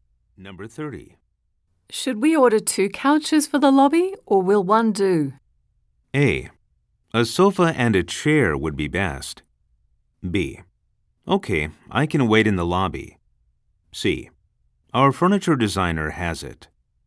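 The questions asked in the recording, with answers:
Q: Should we order two couches for the lobby, or will one do?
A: A: A sofa and a chair would be best.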